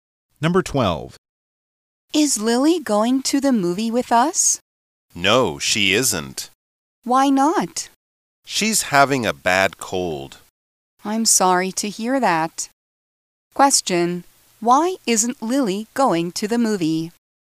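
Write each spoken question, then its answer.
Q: Why isn't Lily going to the movie?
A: She has a bad cold.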